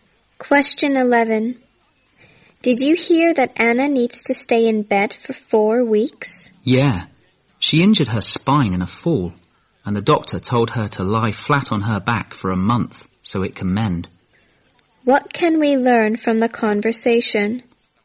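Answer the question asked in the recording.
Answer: Anna hurt her spine in a fall and has to stay in bed for a month.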